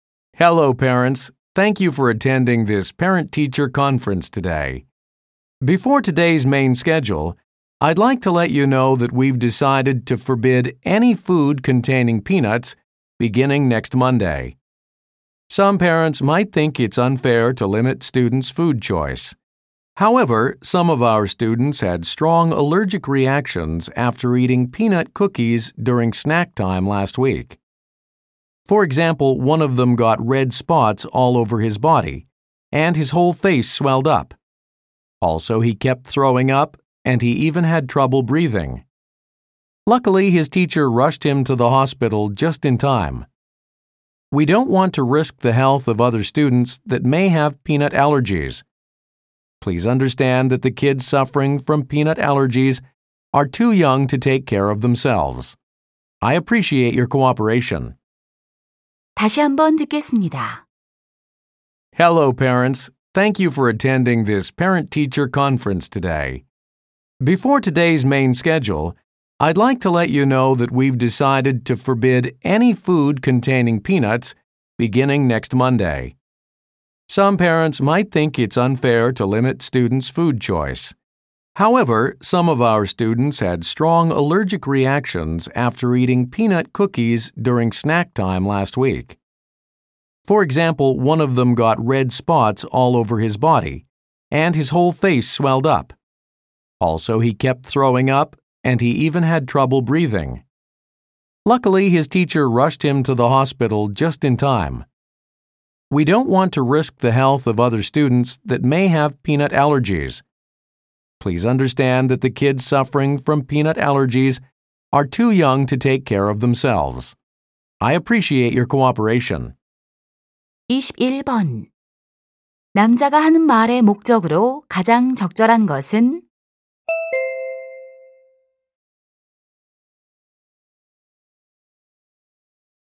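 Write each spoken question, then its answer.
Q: 남자가 하는 말의 목적으로 가장 적절한 것은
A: 땅콩이 든 음식 반입 금지를 알리려고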